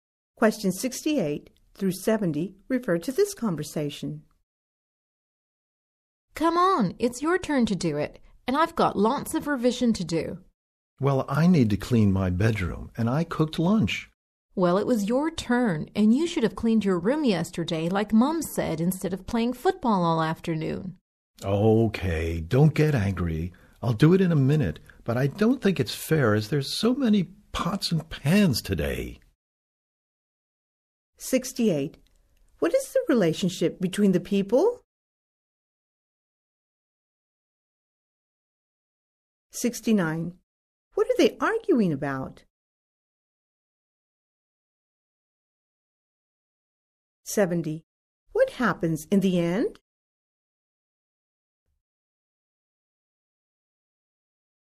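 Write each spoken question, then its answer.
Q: What are they arguing about?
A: Whose turn it is to wash the dishes

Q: What happens in the end?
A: He agrees to wash the dishes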